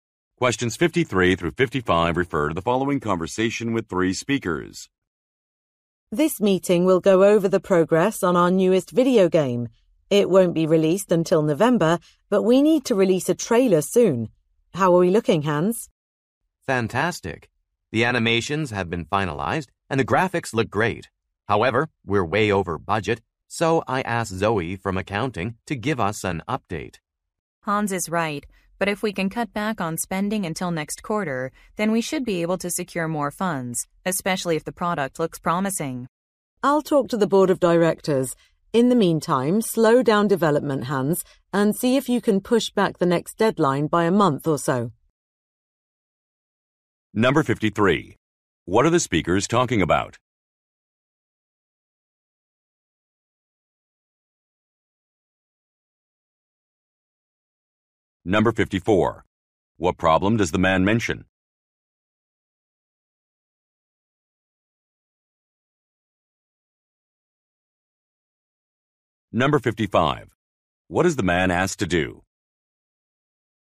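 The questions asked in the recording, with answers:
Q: What are the speakers talking about?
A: Progress on a new video game

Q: What problem does the man mention?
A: They are over budget

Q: What is the man asked to do?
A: Slow down development and push back the deadline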